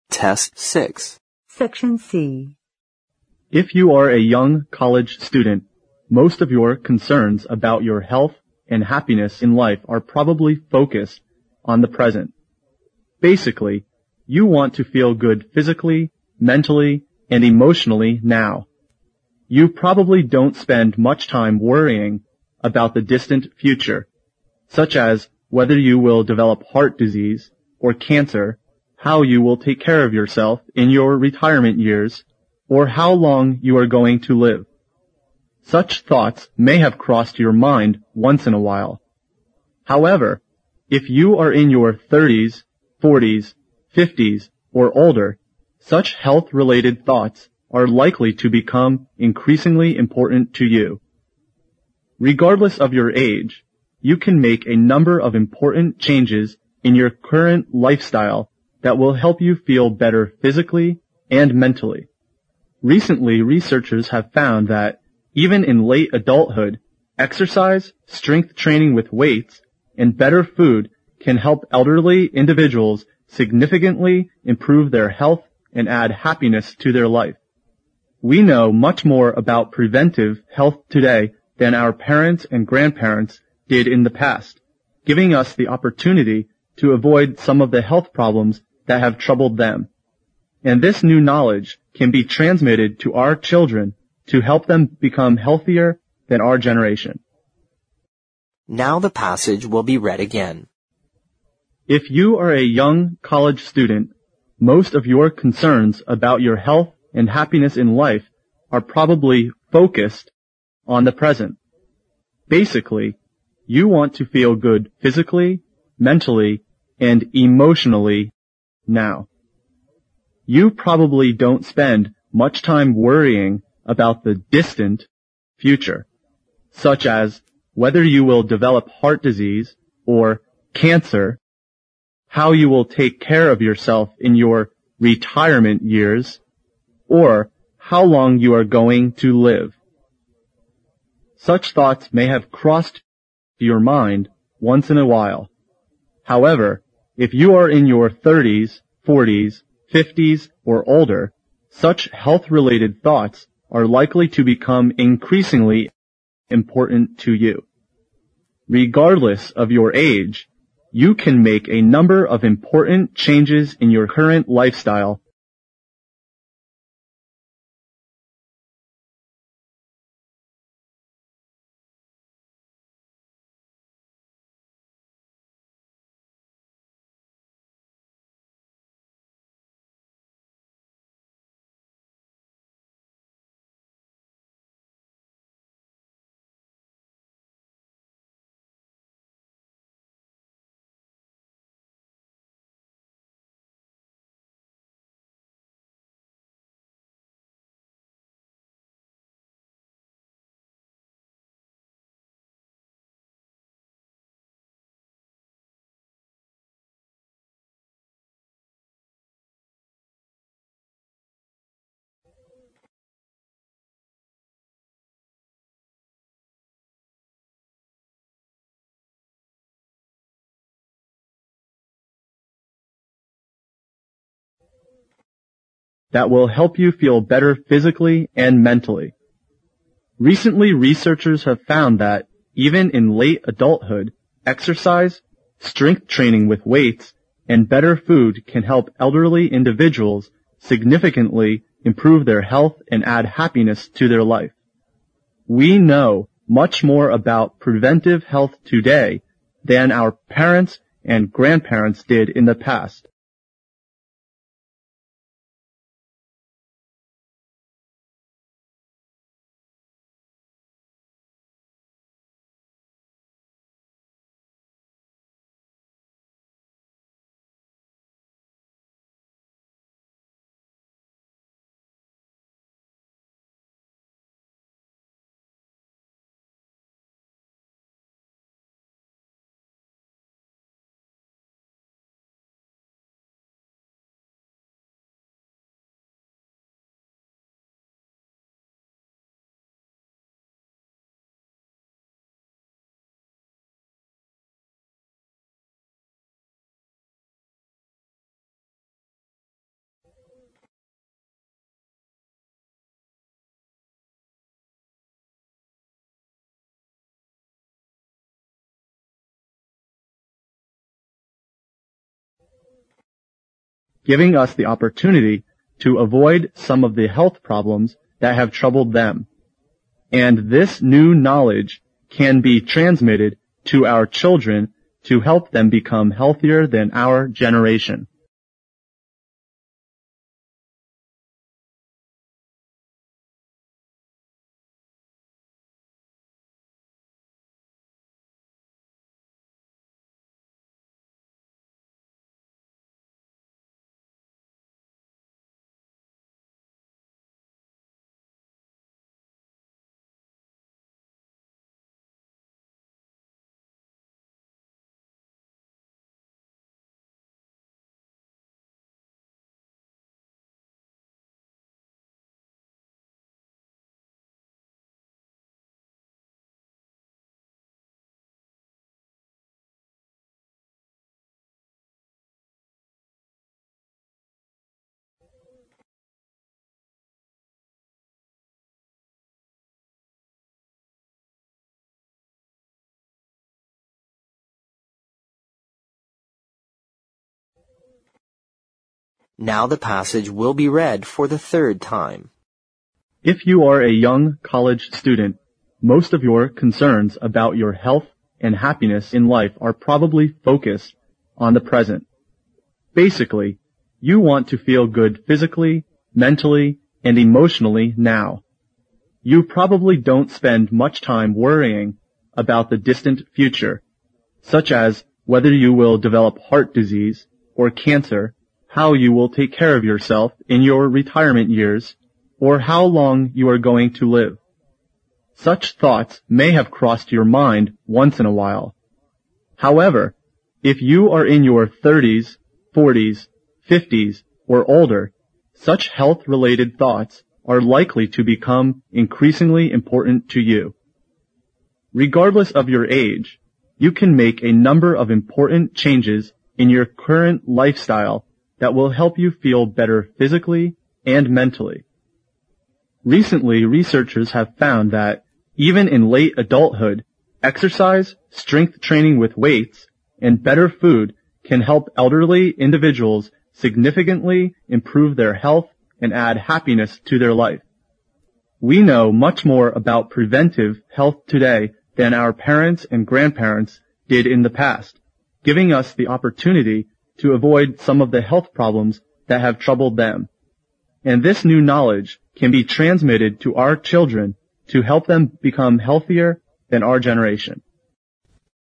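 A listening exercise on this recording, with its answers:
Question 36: If you are a young college student, most of your concerns about your health and happiness in life are probably (36) ______ on the present.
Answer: focused

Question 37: (37) ______ , you want to feel good physically, mentally, and (38) ______ now.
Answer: Basically

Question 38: (37) ______ , you want to feel good physically, mentally, and (38) ______ now.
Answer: emotionally

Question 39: You probably don't spend much time worrying about the (39) ______ future, such as whether you will develop heart disease, or (40) ______ , how you will take care of yourself in your (41) ______ years, or how long you are going to live.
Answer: distant

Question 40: You probably don't spend much time worrying about the (39) ______ future, such as whether you will develop heart disease, or (40) ______ , how you will take care of yourself in your (41) ______ years, or how long you are going to live.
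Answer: cancer

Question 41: You probably don't spend much time worrying about the (39) ______ future, such as whether you will develop heart disease, or (40) ______ , how you will take care of yourself in your (41) ______ years, or how long you are going to live.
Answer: retirement

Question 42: Such thoughts may have (42) ______ your mind once in a while, however, if you are in your thirties, forties, fifties, or older, such health related thoughts are likely to become (43) ______ important to you.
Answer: crossed

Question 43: Such thoughts may have (42) ______ your mind once in a while, however, if you are in your thirties, forties, fifties, or older, such health related thoughts are likely to become (43) ______ important to you.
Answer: increasingly

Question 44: (44) ________________________________________________________ that will help you feel better physically and mentally.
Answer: Regardless of your age, you can make a number of important changes in your current lifestyle

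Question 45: (45) ______________________________________________________ giving us the opportunity to avoid some of the health problems that have troubled them.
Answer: We know much more about preventive health today than our parents and grandparents did in the past,

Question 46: (46) __________________________________________________________ .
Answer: And this new knowledge can be transmitted to our children to help them become healthier than our generation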